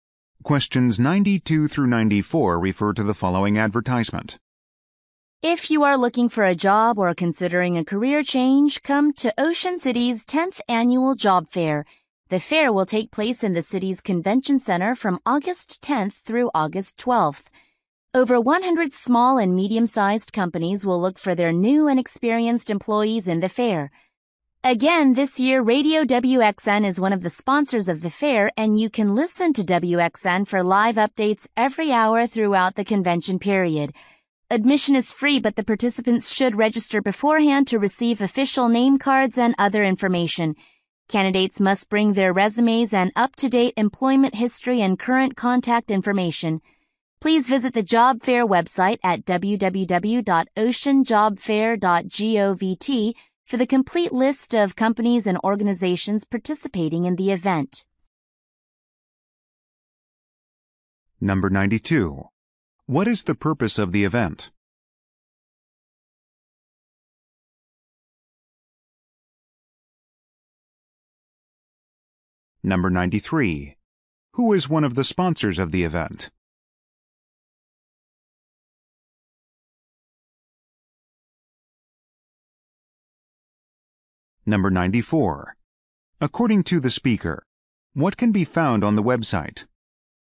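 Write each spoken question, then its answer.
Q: What is the purpose of the event?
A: To help people find jobs

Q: Who is one of the sponsors of the event?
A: Radio WXN

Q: According to the speaker, what can be found on the website?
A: A complete list of participating companies and organizations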